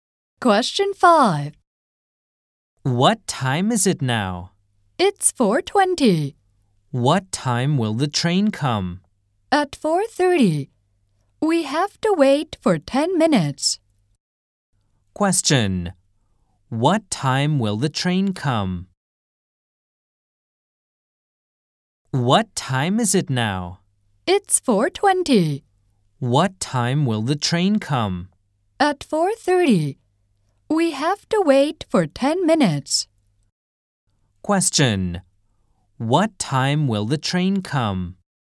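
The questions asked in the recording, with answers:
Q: What time will the train come?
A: At 4:30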